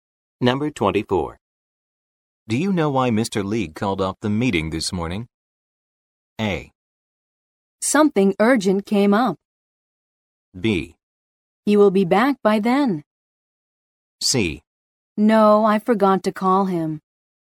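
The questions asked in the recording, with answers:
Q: Do you know why Mr. Lee called off the meeting this morning?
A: A: Something urgent came up.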